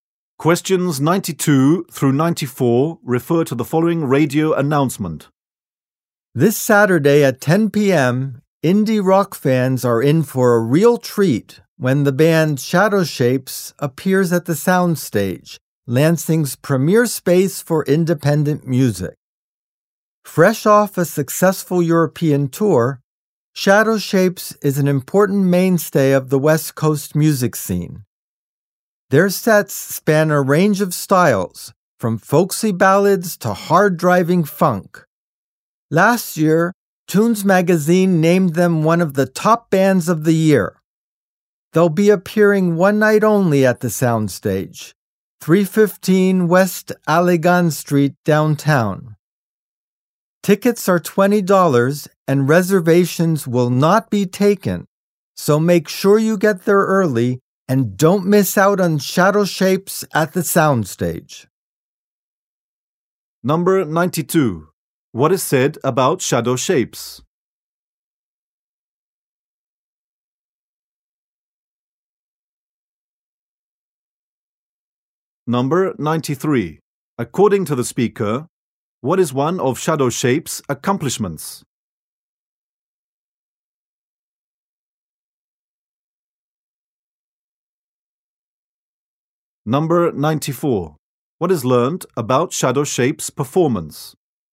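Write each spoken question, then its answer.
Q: What is said about Shadow Shapes?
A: It is a mainstay of the West Coast music scene and just finished a European tour.

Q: According to the speaker, what is one of Shadow Shapes' accomplishments?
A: Tunes Magazine named them one of the top bands of the year.

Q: What is learned about Shadow Shapes' performance?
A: It is one night only, tickets are $20, and no reservations are taken.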